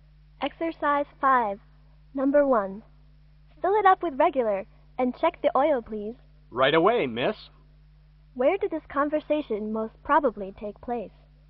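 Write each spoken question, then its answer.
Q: Where did this conversation most probably take place?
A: At a gas station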